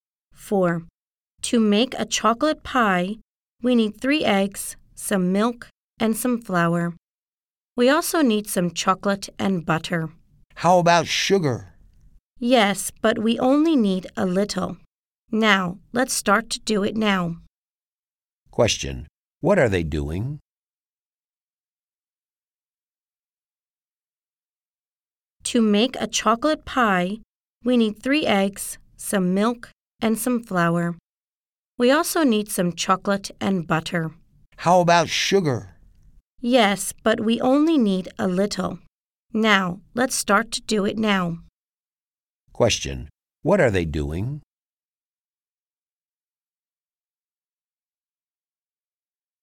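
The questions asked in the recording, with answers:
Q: Question. What are they doing?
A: Making a chocolate pie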